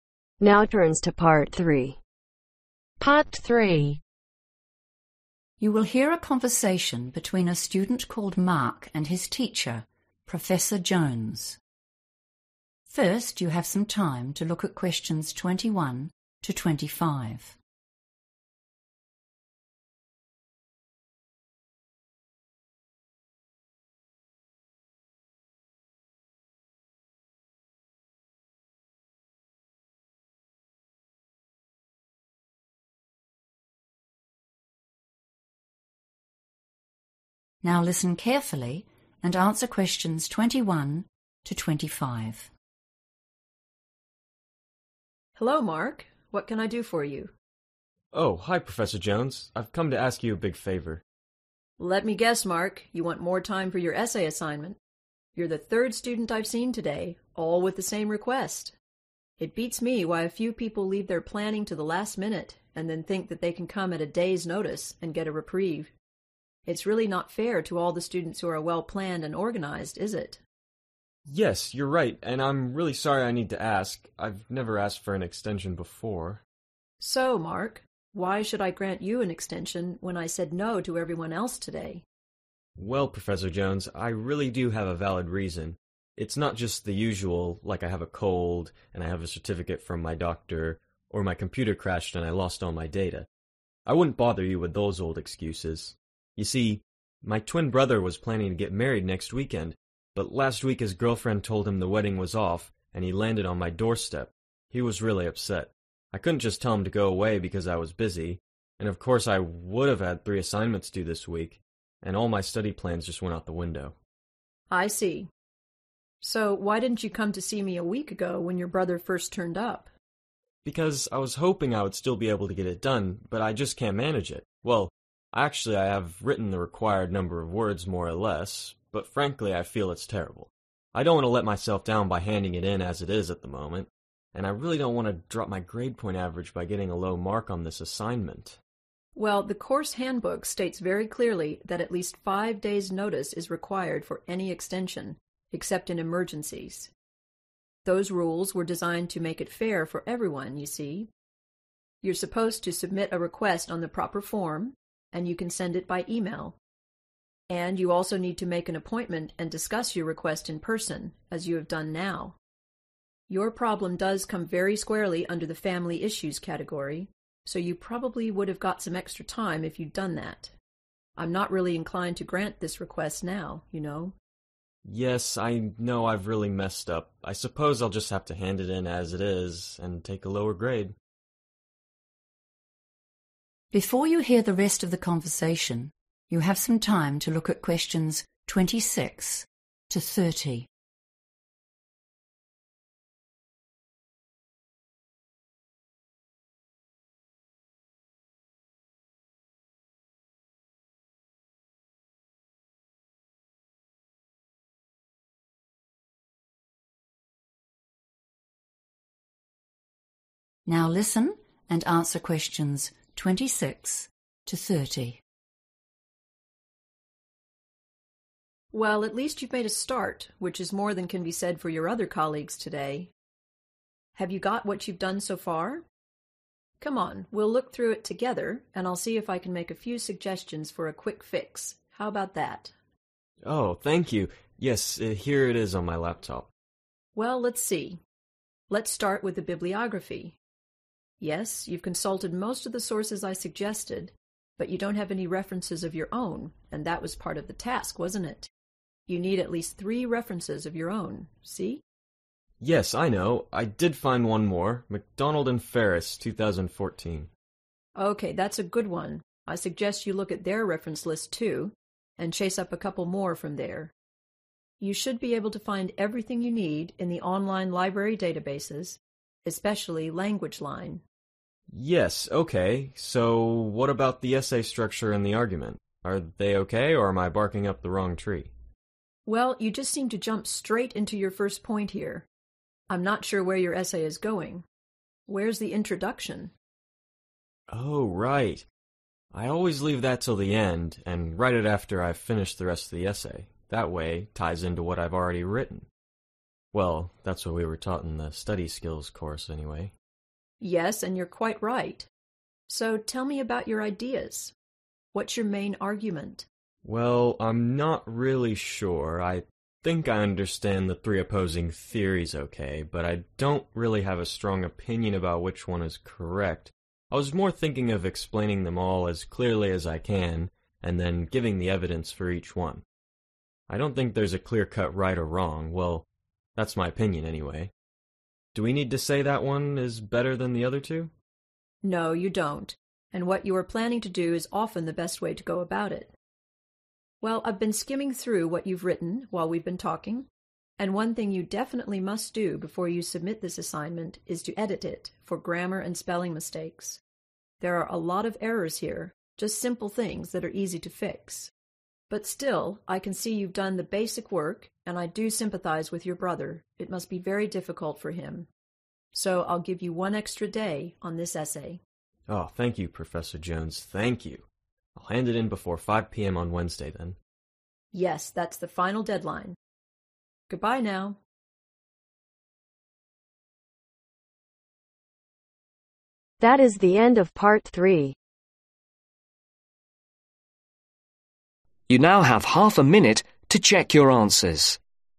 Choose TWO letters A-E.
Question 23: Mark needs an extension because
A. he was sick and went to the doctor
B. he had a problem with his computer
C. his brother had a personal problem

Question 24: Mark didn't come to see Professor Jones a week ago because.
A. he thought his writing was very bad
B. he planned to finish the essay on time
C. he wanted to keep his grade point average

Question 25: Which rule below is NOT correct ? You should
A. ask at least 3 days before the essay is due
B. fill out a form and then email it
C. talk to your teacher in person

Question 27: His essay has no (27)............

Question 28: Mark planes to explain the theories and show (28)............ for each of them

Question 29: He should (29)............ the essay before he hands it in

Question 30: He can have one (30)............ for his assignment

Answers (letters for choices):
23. C
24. B
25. A
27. Introduction
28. Evidence
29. Edit
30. Extra Day